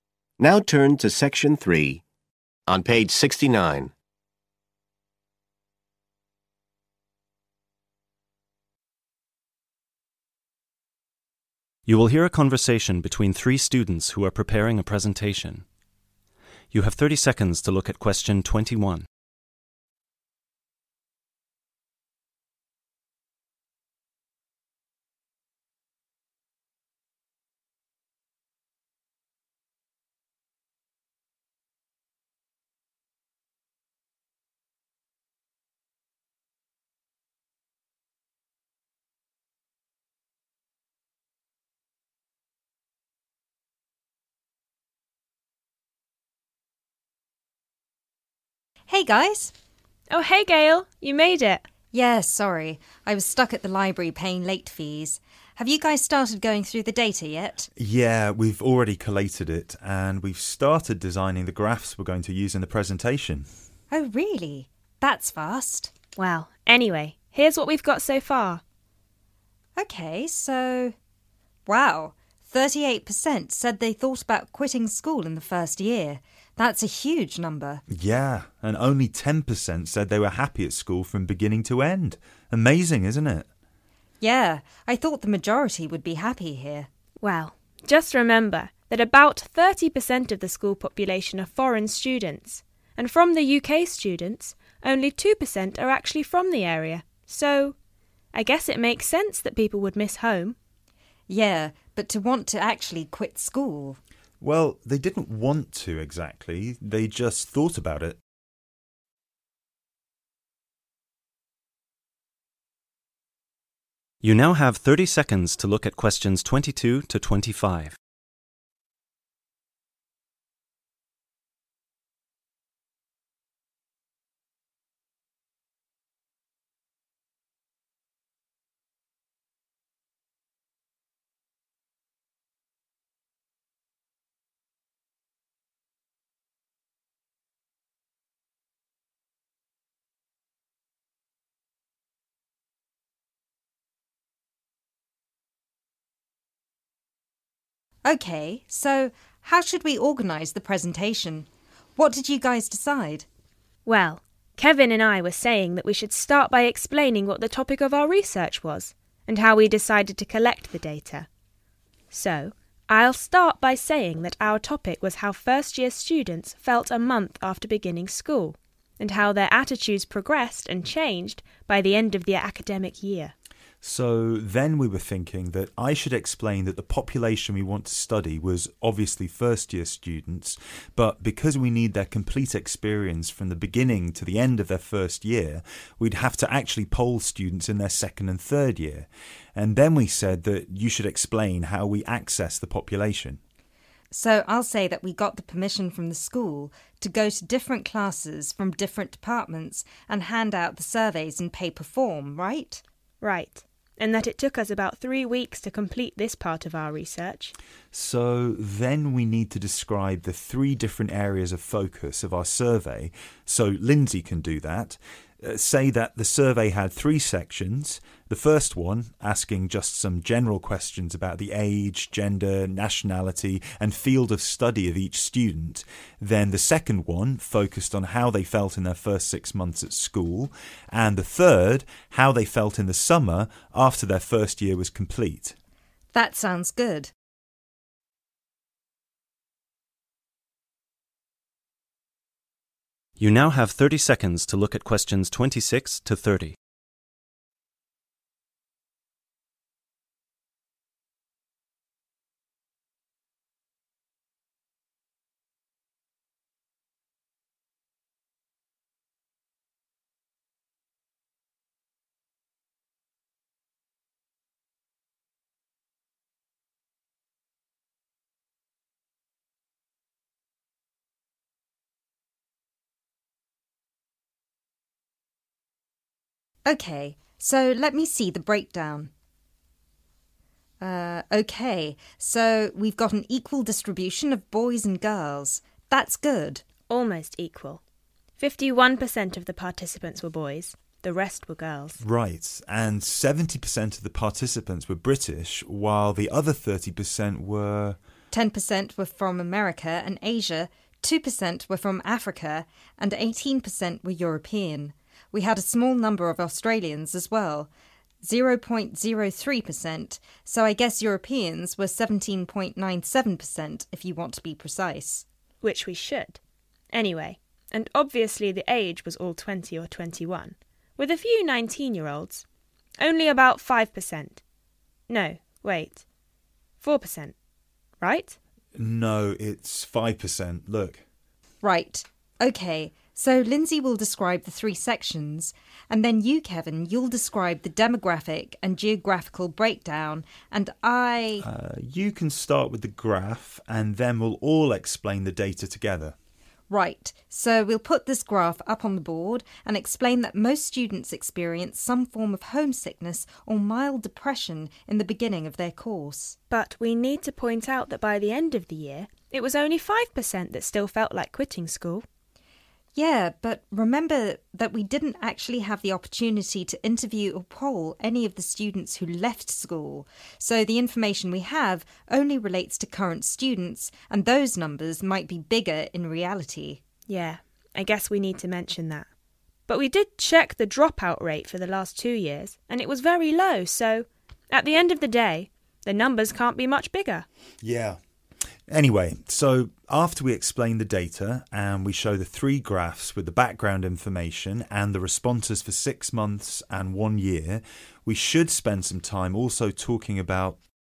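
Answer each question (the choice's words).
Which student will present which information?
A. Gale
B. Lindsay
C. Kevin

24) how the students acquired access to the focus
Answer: Gale

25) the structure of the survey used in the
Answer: Lindsay

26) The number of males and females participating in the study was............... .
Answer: almost equal

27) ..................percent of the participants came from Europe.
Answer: 17.97

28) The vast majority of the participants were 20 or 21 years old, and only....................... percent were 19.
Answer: 5

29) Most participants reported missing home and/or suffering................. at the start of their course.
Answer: mild depression

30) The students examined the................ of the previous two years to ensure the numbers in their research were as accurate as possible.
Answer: dropout rate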